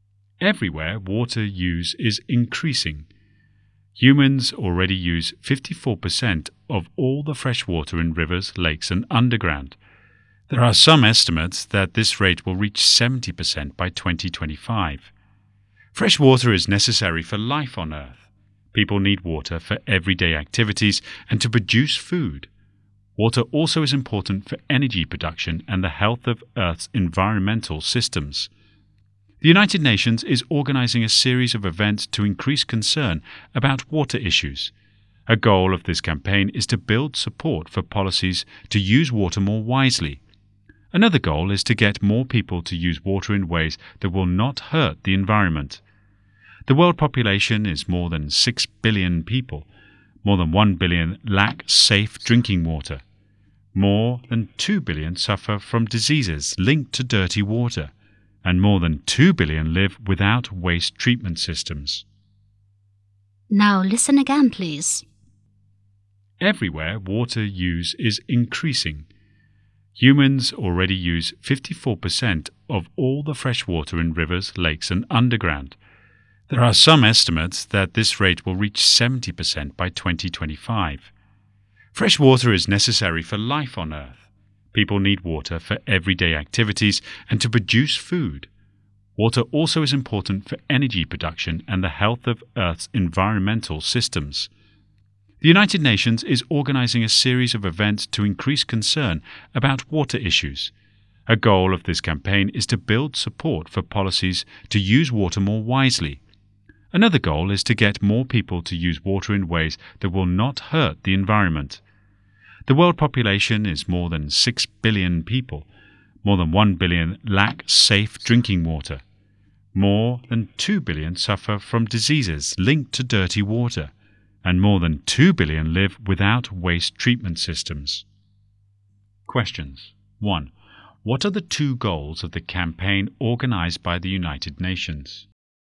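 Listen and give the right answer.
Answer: To build support for policies to use water more wisely, and to get more people to use water in ways that will not hurt the environment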